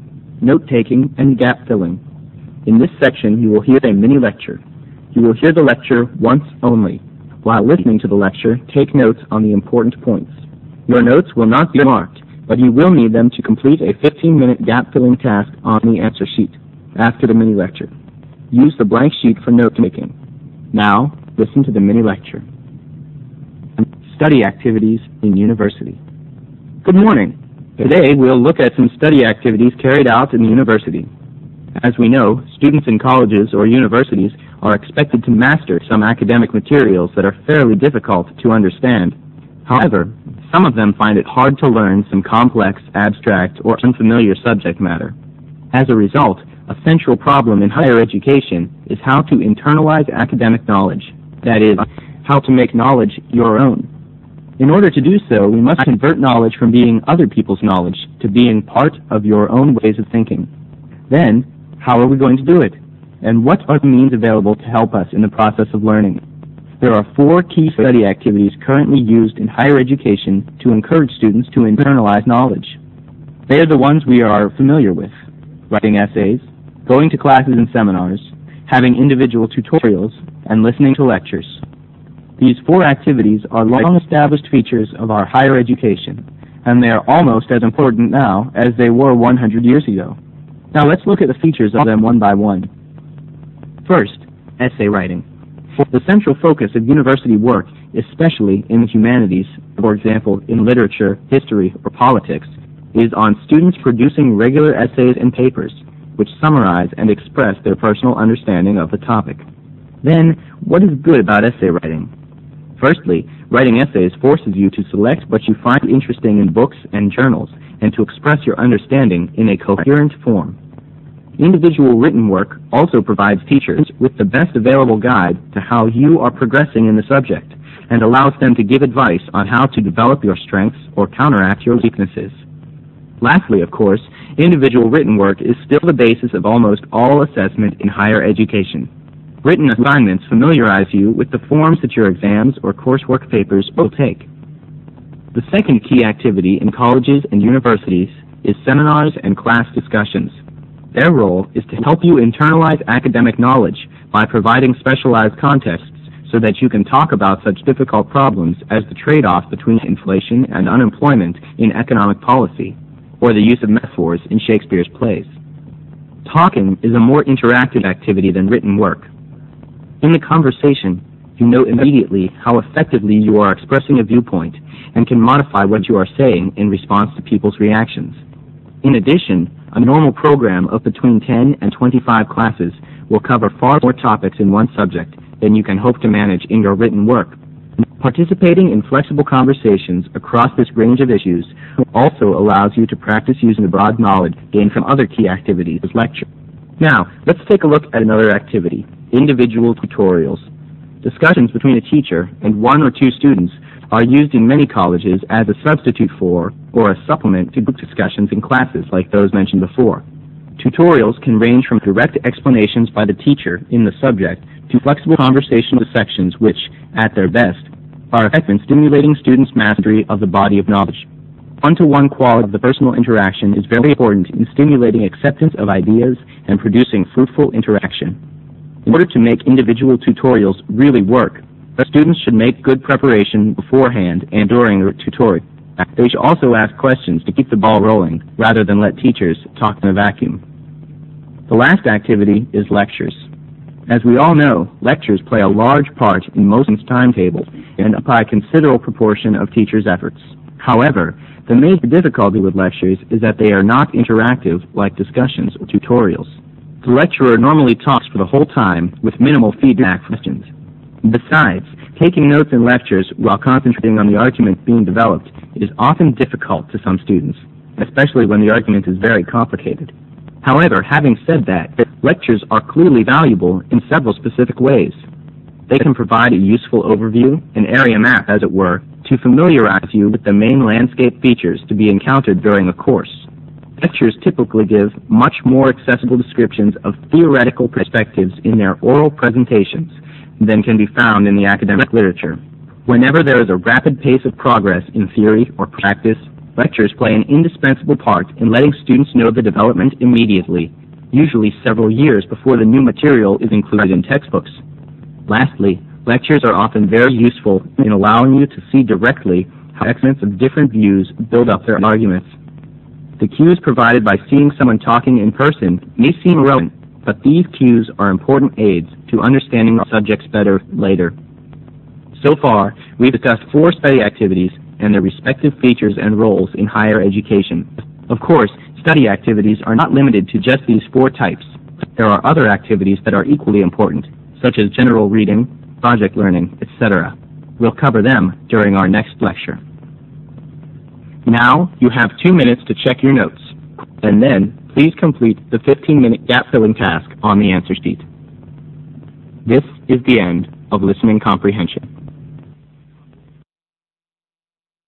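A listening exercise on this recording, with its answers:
In this section you will hear a mini-lecture ONCE ONLY. While listening to the lecture, take notes on the important points. Your notes will not be marked, but you will need them to complete a 15-minute gap-filling task on ANSWER SHEET ONE after the mini-lecture. Use the blank paper for note-taking. Fill in each of the gaps with one word. You may refer to your notes. Make sure the word you fill in is both grammatically and semantically acceptable.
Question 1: Essay writing: central focus of university work esp. in the humanities, e.g. (1)_ .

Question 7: disadvantages: 1) less (7)____ than discussions or tutorial.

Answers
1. literature
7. interactive

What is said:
SECTION D NOTE-TAKING AND GAP-FILLING
Good morning, today well look at some study activities carried out in university as we know, students in colleges or universities are expected to master some academic materials that are fairly difficult to understand. 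However, some of them find it hard to learn some complex, abstract or unfamiliar subject matter. As a result, a central problem in higher education is how to internalize academic knowledge, that is, how to make knowledge your own. In order to do so we must convert knowledge from being other's knowledge to being part of our own way of thinking.
Then how are we going to do it? What's the means available to help us in the process of learning? There are four key study activities currently used in higher education to encourage students to internalize knowledge. They are the ones we are familiar with: writing essay, going to classes and seminars, having individual tutorials and listening to lectures. The four activities are long-established features of our higher education, and they are as important now as they were a hundred years ago. Now let's look at the features of them one by one.
First, essay writing. 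The central focus of university work, especially in humanities, for example in literature, history or politics, is on students' producing regular essays or papers which summarize and express their personal understanding of the topic. Then what is good about essay writing? Firstly, writing essays forces you to select what you find interesting in books and journals and to express your understanding in the coherent form. Individual written work also provides teachers with the best available guide to how you are processing in the subject, and allows them to give advice on how to develop your strengths or counteract your weaknesses. Lastly, of course, individual written work is still the basis of almost all assessment in higher education. Written assignments familiarize you with the form of your exams or course what papers will take.
The second key activity in colleges and universities is seminars and class discussions. 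Their role is to help you to internalize academic knowledge by providing specialized contexts so that you can talk about such difficult problems as the treat of between inflation and the unemployment in economic policy or the use of the metaphors in Shakespeare's plays. Talking is a more interactive activity than written work. In the conversation you know immediately how effective you are in expressing your point and can modify what you are saying in response to people's reactions. In addition, a normal program of between 10 to 25 classes will cover far more topics than one subject. Then you can hope to manage your written work. Participating in flexible conversations across this range of issues also allows you to practice using the broader knowledge gained from other key activities such as lectures.
Now let's take a look at another activity, individual tutorials. Discussions between the teacher and one or two students are used in many colleges as a substitute for or supplement to group discussion in classes like those mentioned before. 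Tutorials can range from direct explanation by teacher and subject to flexible conversational sessions which at their best very effective in stimulating students' mastery of body of knowledge. The one-to-one quality of the personal interaction is very important in stimulating acceptance of ideas and producing fruitful interaction. In order to make individual tutorial really work, students should make good preparation beforehand, and during the tutorial they also should ask questions to keep the ball rolling rather than let the teachers talk the vacuum.
The last activity is lectures. As we all know, lectures play a large part of most students' timetable and occupy considerable proportion of teachers' efforts. However the major difficulty with lectures is that they are not interactive like discussion or tutorials. The lecturer normally talks for the whole time with minimal feed-back from questions. 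The signs making notes the lecture well-concentrating on the argument being developed is often difficult to some students, especially when the argument is very complicated. However, we have said that lectures are clearly valuable in several specific ways. They can provide a useful overview in every map, as it were, to familiarize you with the mainland features to be encountered during the course. Lectures typically give much more accessible descriptions of theoretical perspectives in their oral presentations that can be found in the academic literature. Whenever there is a rapid pace of progress in theory or practice, lectures play an indispensable part in letting students know the development immediately, usually several years before the new material is included in textbooks. Lastly, lectures are often very useful in allowing you to see directly how exponents of different views build up their arguments. 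The cues provided by things someone talking in person may seem irrelevant, but these cues are important aids to understanding the subject matter better later.
So far we've discussed four study activities and their respective features and roles in higher education. Of course, study activities are not limited to just these four types. There're other activities that are equally important, such as general reading, project learning, etc. We will cover them during our next lecture.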